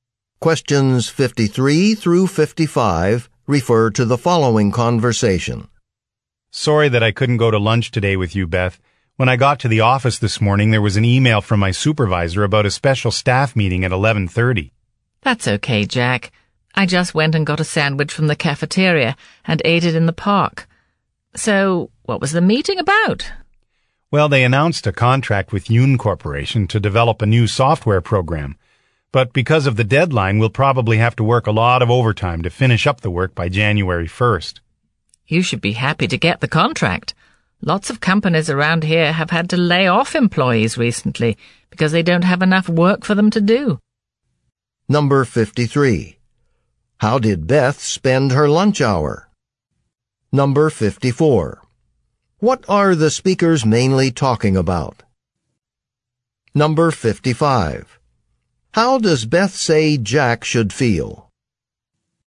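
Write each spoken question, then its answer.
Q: How did Beth spend her lunch hour?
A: She got a sandwich from the cafeteria and ate it in the park

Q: What are the speakers mainly talking about?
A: A meeting about a new software contract

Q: How does Beth say Jack should feel?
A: Happy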